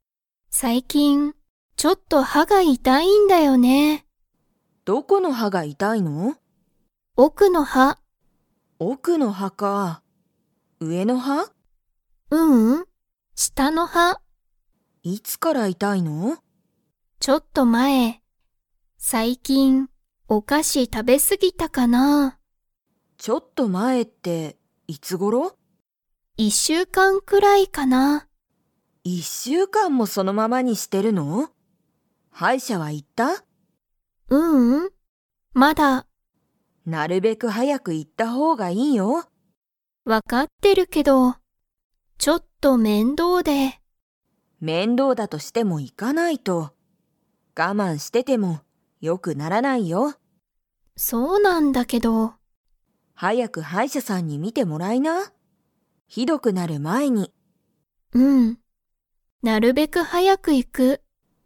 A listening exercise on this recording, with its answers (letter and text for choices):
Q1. アミは くらい前まえから歯はが痛いたい。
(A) 一日いちにち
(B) 二日ふつか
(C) 一週間いっしゅうかん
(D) 二週間にしゅうかん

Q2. アミは、もう歯医者はいしゃに行いきましたか?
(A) はい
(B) いいえ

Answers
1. (C) 一週間いっしゅうかん
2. (B) いいえ

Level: Level 4